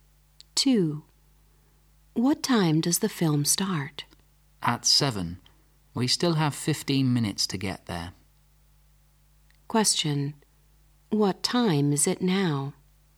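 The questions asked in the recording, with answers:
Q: What time is it now?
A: 6:45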